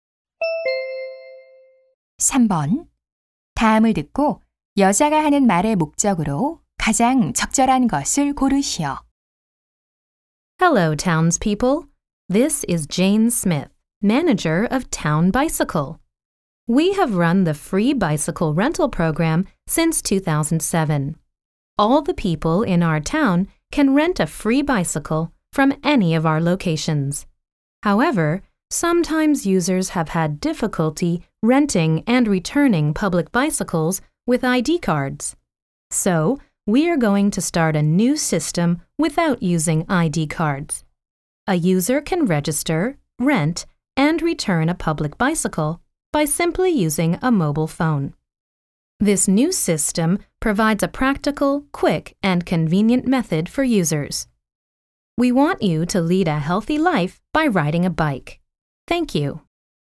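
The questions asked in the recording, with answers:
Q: 다음을 듣고 여자가 하는 말의 목적으로 가장 적절한 것을 고르시오.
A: 신분증 없이 휴대폰으로 이용하는 새 공공자전거 대여 시스템을 안내하려고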